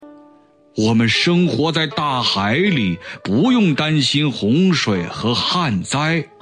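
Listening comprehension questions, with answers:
★音声を聞き、空欄〇に当てはまる単語を探して、授業内課題用紙に漢字とピンインを書いてください。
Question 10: 我们生活在大海里,不用〇〇洪水和旱灾。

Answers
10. 担心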